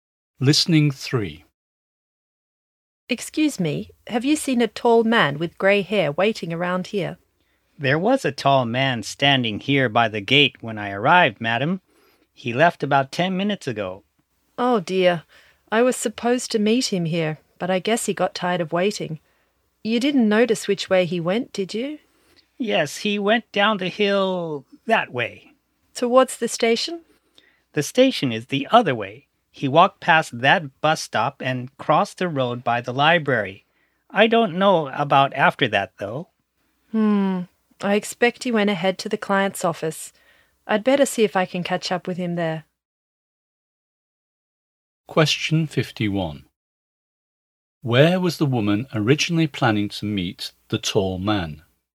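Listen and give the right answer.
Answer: By the gate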